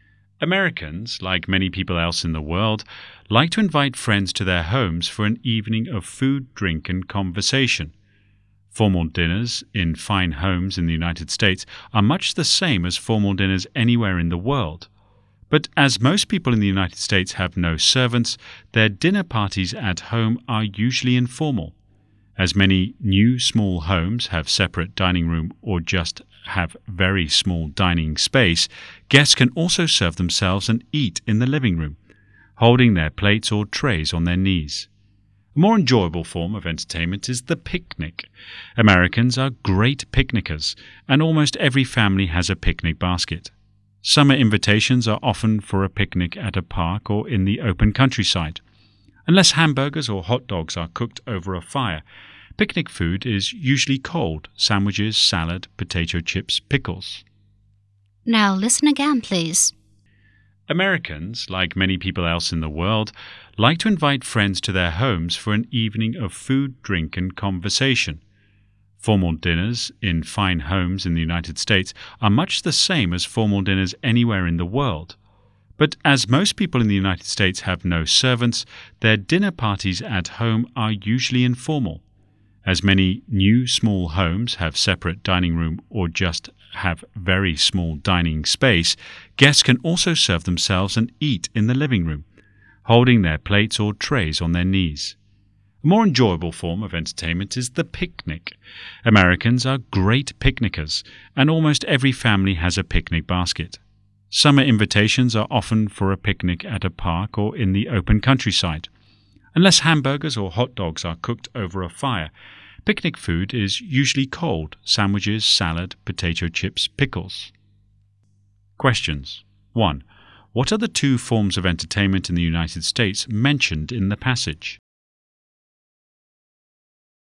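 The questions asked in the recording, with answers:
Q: What are the 2 forms of entertainment in the United States mentioned in the passage?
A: Informal dinner parties at home and picnics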